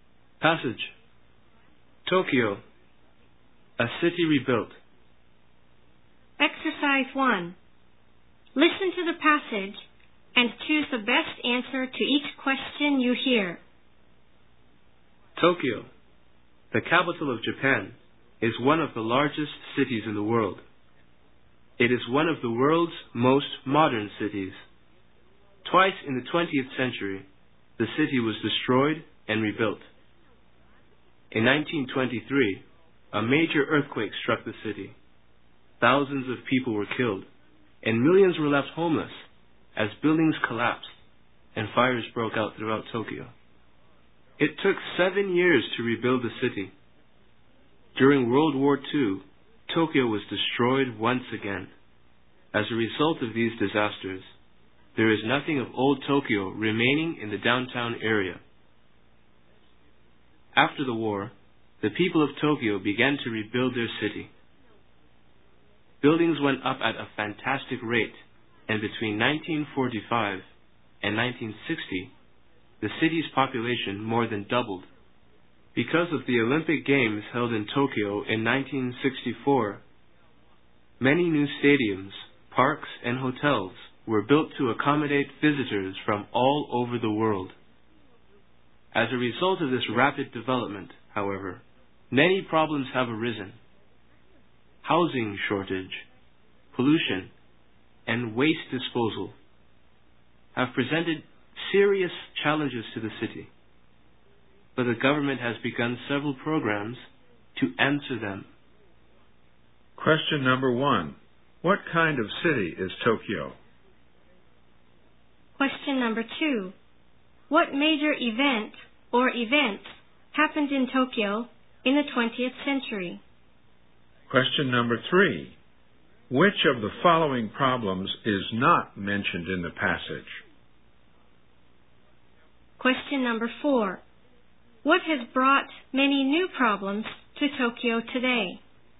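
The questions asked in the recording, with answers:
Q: What kind of city is Tokyo?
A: One of the largest and most modern cities in the world

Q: What major event or events happened in Tokyo in the 20th century?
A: The 1923 earthquake, destruction in World War II, and the 1964 Olympic Games

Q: What has brought many new problems to Tokyo today?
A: Rapid development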